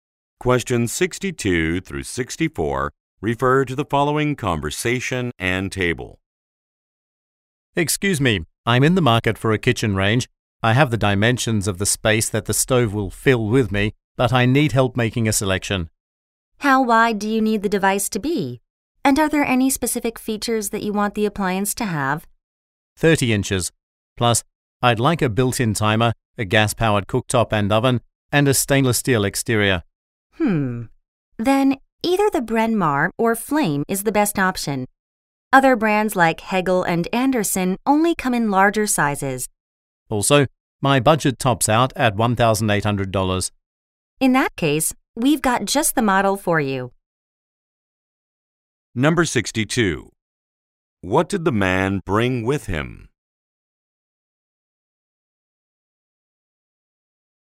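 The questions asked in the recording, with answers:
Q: What did the man bring with him?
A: The dimensions of the space for the stove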